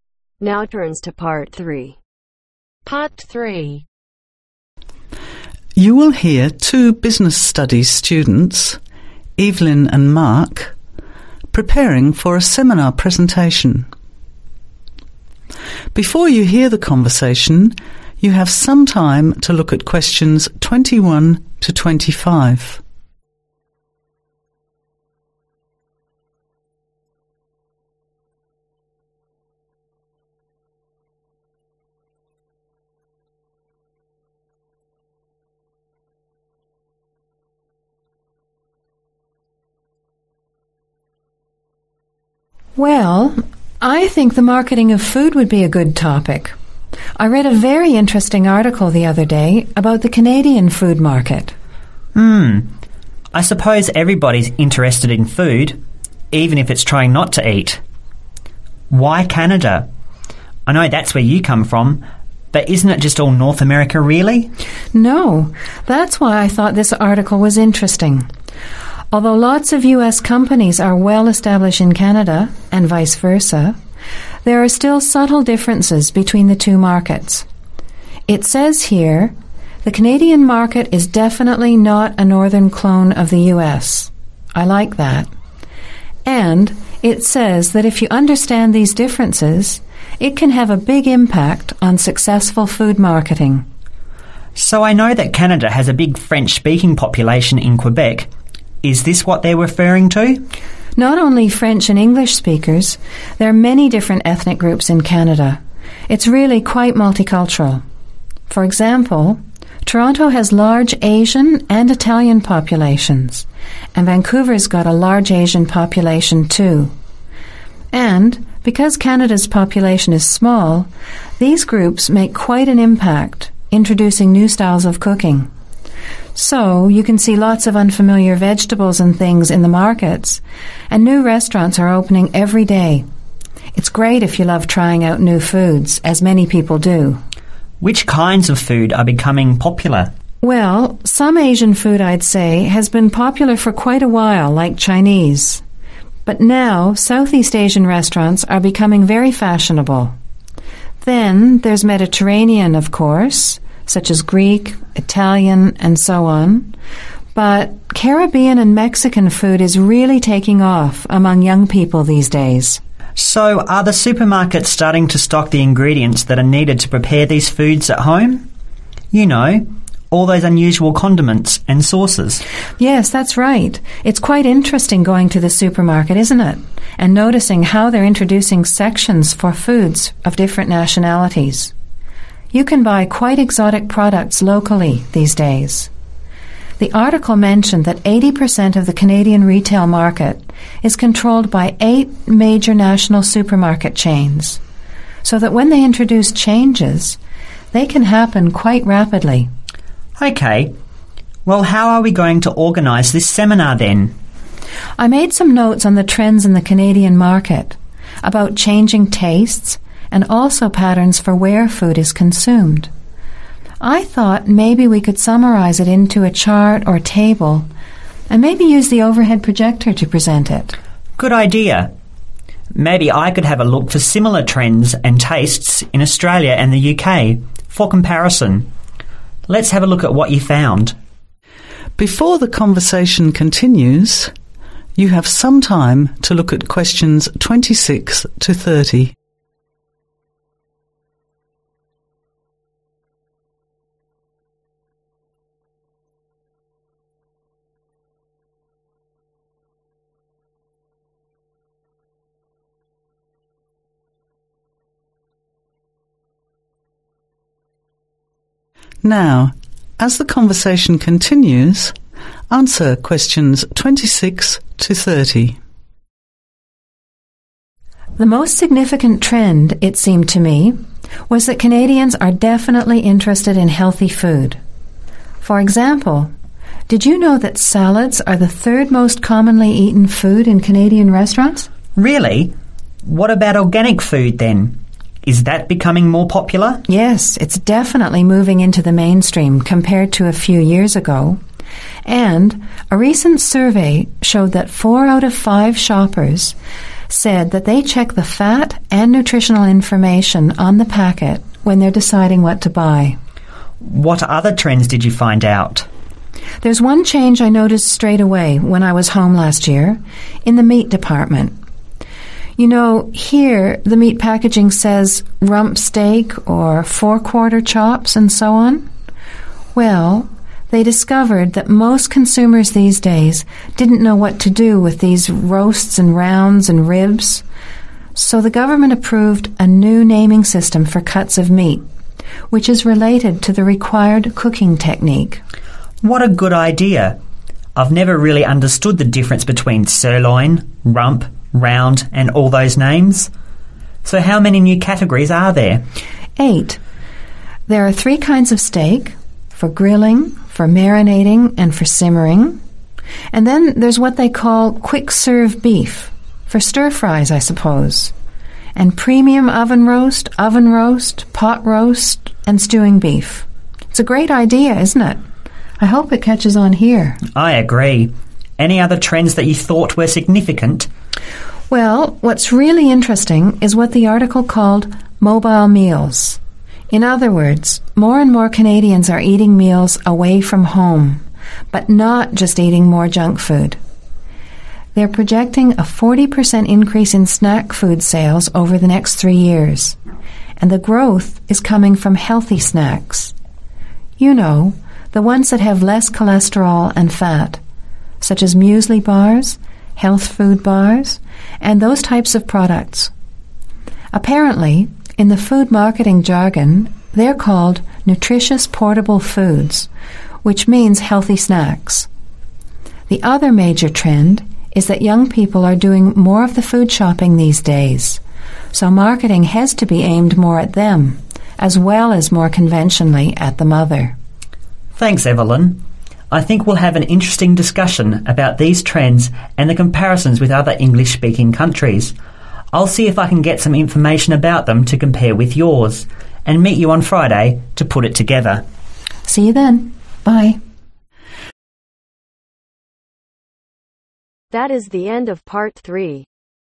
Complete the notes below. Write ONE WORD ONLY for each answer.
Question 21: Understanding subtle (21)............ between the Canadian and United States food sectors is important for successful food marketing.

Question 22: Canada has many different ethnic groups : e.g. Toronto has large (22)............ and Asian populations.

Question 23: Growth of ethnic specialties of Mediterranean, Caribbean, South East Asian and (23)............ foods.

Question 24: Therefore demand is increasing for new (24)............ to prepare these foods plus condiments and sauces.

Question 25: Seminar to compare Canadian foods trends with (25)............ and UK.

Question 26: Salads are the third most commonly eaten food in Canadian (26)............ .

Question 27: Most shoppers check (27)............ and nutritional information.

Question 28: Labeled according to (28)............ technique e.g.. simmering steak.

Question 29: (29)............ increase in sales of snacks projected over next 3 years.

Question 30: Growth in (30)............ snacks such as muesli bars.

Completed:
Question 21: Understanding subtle Differences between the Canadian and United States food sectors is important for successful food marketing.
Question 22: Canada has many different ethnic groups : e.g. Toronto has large Italian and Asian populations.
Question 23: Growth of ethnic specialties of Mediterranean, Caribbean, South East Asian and Mexican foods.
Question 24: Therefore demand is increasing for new Ingredients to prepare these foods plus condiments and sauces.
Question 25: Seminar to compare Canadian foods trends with Australia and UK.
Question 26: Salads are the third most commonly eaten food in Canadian Restaurants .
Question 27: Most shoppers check Fat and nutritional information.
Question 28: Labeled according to Cooking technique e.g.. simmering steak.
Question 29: 40% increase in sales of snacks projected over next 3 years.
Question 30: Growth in Healthy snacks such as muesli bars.